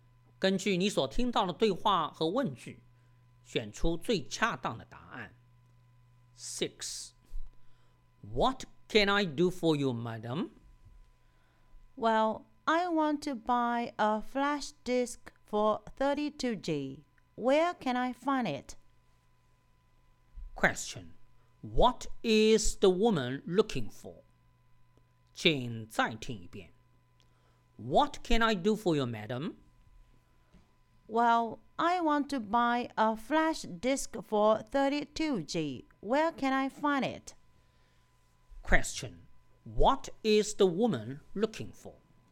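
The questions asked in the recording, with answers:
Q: What is the woman looking for?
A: A 32G flash disk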